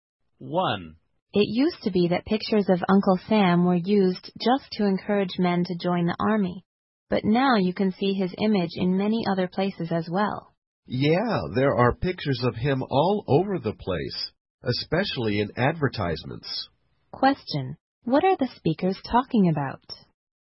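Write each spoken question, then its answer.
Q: What are the speakers talking about?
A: Uncle Sam's image and where it is used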